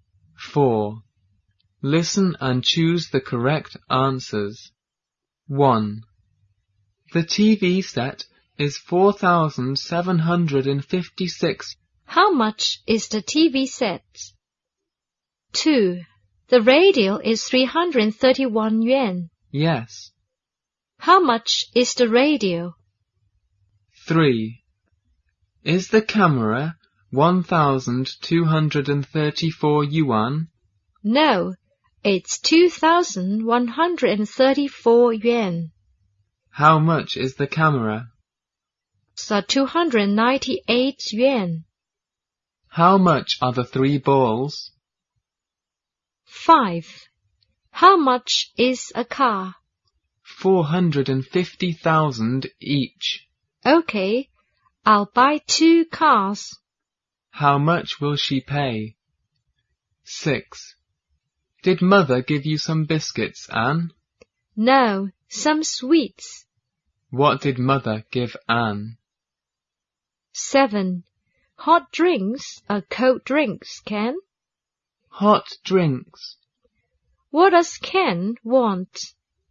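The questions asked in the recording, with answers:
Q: How much is the radio?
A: 331 yuan

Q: How much is the camera?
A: 2,134 yuan

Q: How much will she pay?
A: 900,000

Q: What did mother give Anne?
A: Some sweets

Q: What does Ken want?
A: Hot drinks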